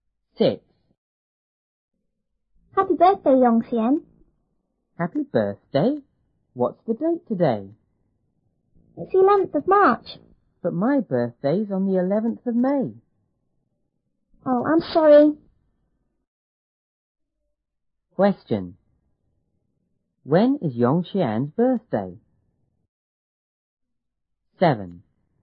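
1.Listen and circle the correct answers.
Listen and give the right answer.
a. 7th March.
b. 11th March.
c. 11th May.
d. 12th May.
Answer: c. 11th May.

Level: 初中英语广州版1B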